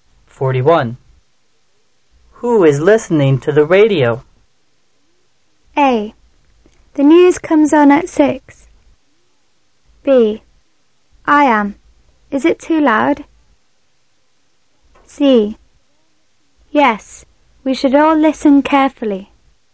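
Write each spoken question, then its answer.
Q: Who is listening to the radio?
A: B: I am. Is it too loud?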